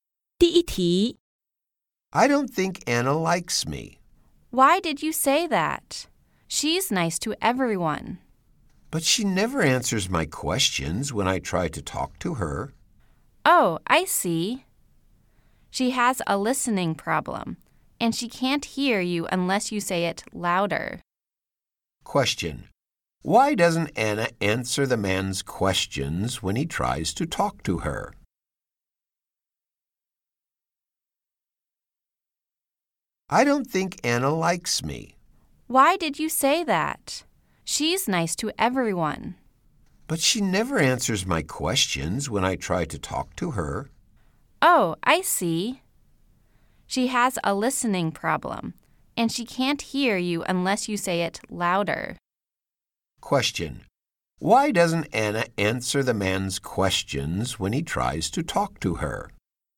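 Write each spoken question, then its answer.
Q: Why doesn't Anna answer the man's questions when he tries to talk to her?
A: She has a listening problem and can't hear him unless he speaks louder.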